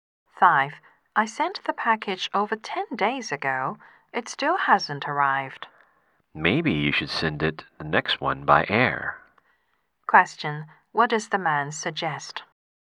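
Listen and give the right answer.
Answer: Send the next package by air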